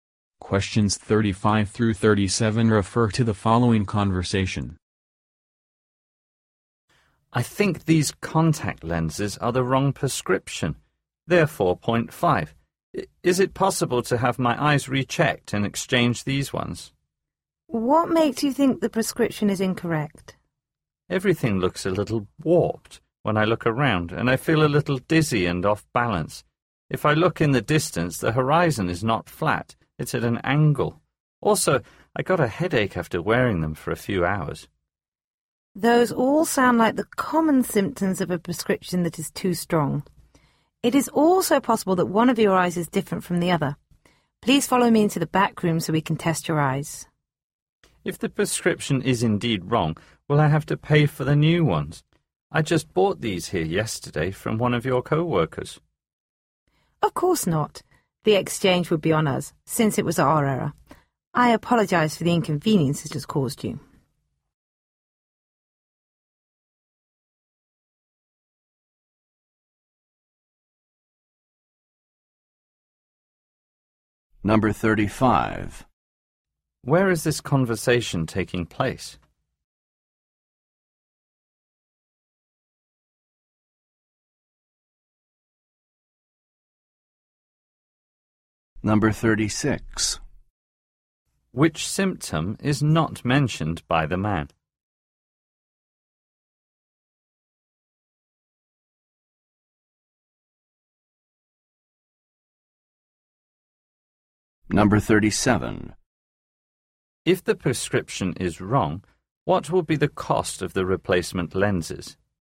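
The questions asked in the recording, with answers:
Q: Where is this conversation taking place?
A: At an optician's/eye care store

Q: If the prescription is wrong, what will be the cost of the replacement lenses?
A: Nothing; free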